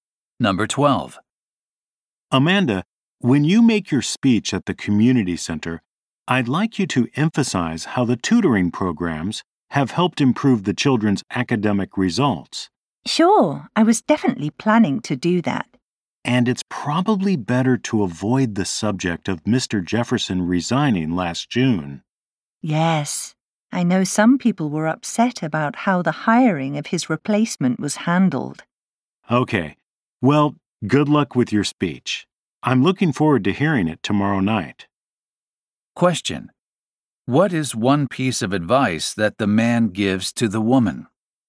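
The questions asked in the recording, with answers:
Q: What is one piece of advice that the man gives to the woman?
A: Avoid talking about Mr. Jefferson's resignation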